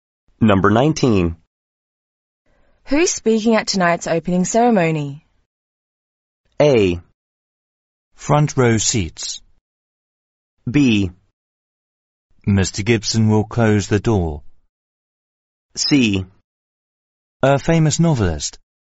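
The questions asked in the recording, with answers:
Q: Who's speaking at tonight's opening ceremony?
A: C: A famous novelist.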